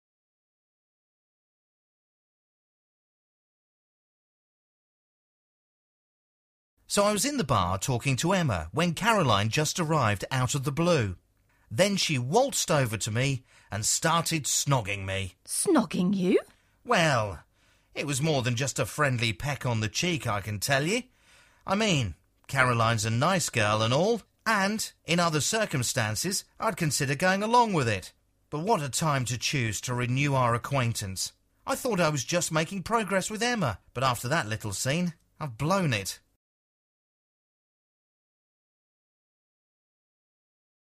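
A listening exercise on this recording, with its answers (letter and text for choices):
Who is Caroline?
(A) The man's mother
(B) The man's boss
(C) The man's ex-girlfriend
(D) The man's sister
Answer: (C) The man's ex-girlfriend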